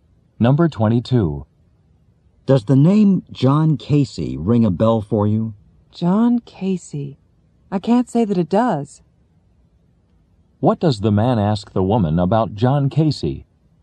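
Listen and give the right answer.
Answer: Whether she knows or remembers him.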